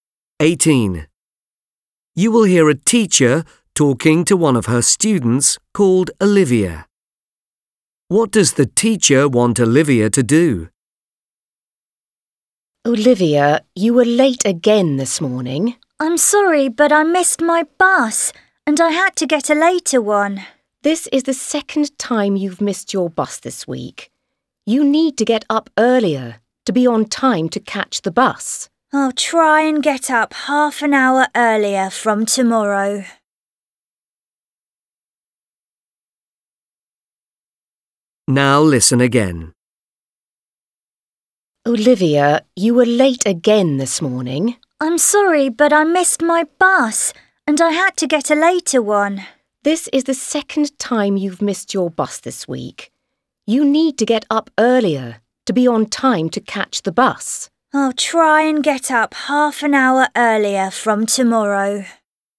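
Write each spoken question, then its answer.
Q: What does the teacher want Olivia to do?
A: get up earlier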